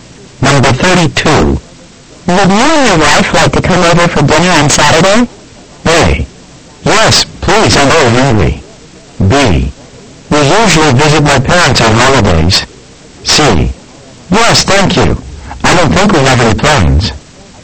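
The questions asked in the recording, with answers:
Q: Would you and your wife like to come over for dinner on Saturday?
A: C: Yes, thank you. I don't think we have any plans.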